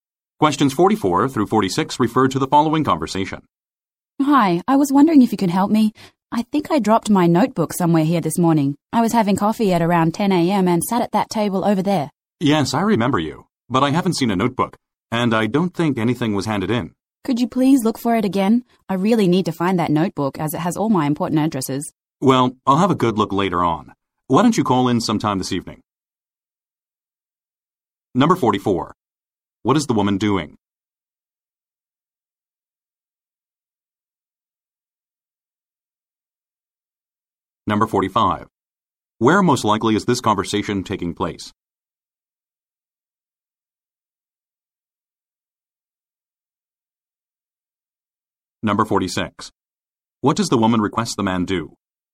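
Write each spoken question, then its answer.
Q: What is the woman doing?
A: Looking for her lost notebook

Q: Where most likely is this conversation taking place?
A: At a café

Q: What does the woman request the man do?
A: Look for her notebook again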